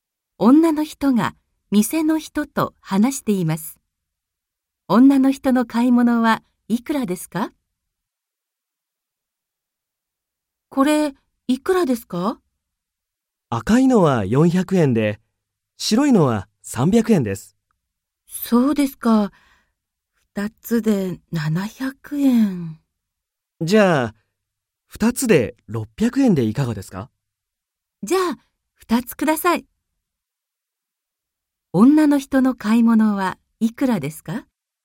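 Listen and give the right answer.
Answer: 600円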